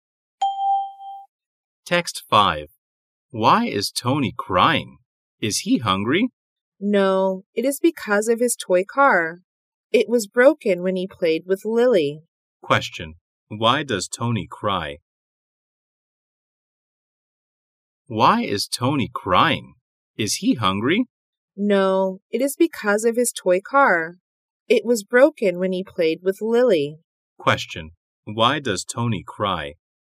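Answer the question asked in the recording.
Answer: Because his toy car was broken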